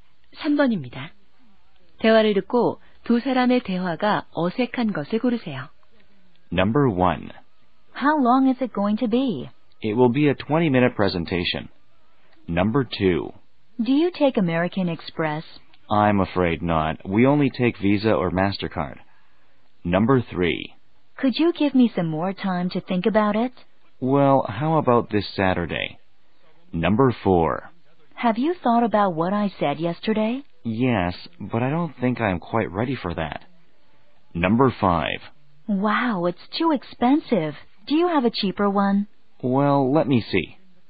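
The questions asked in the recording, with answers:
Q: 대화를 듣고 두 사람의 대화가 어색한 것을 고르세요.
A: 3번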